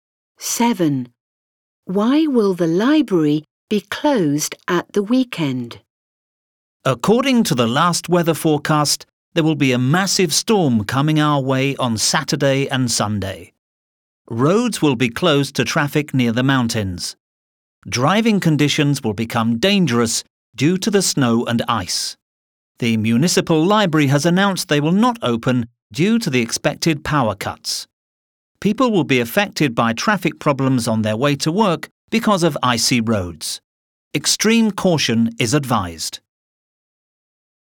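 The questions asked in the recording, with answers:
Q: Why will the library be closed at the weekend?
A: Because of expected power cuts from the storm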